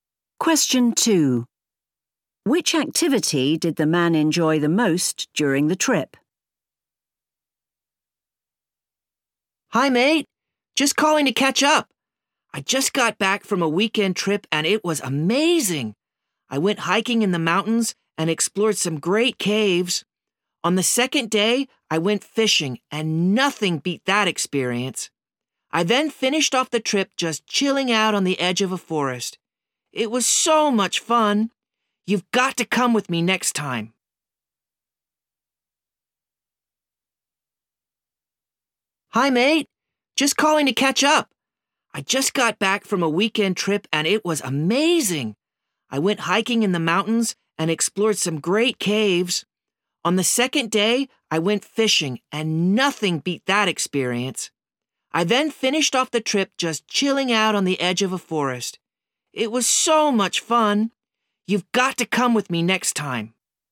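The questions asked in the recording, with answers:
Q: Which activity did the man enjoy the most during the trip?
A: Fishing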